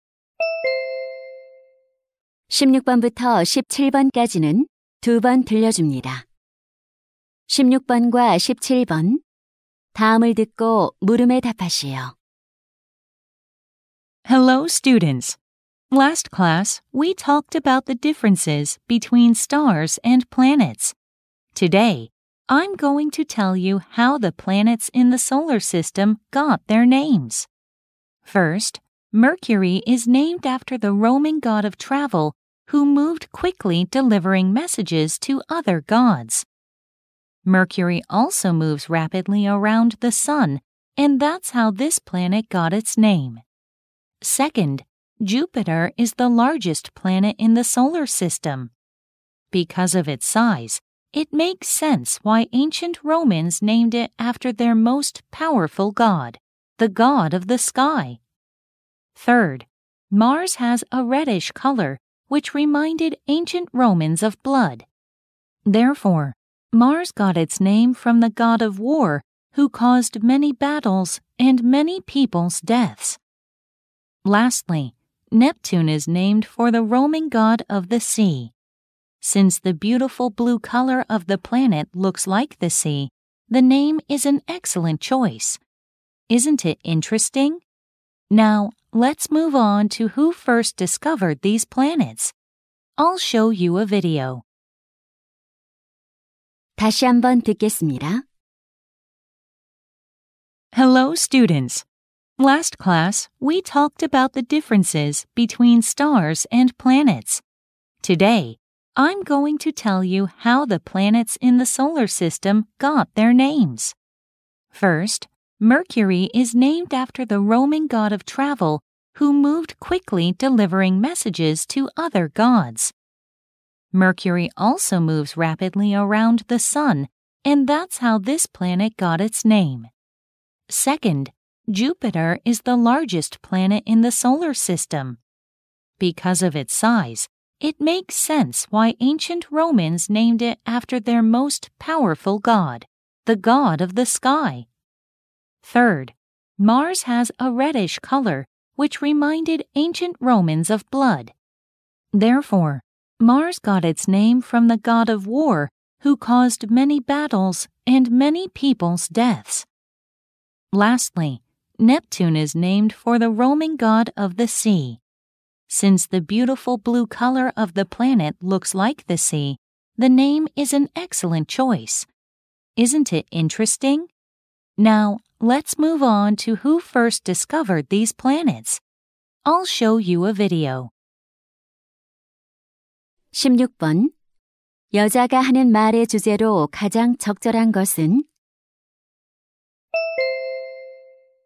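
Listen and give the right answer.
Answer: 태양계 행성들의 이름이 붙여진 유래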